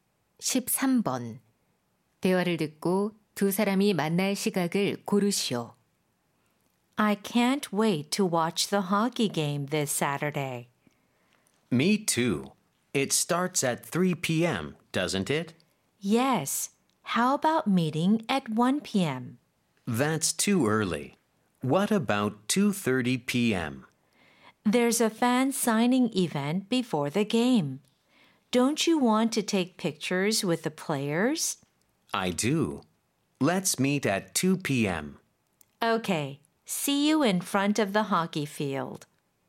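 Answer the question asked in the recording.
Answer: 오후 2시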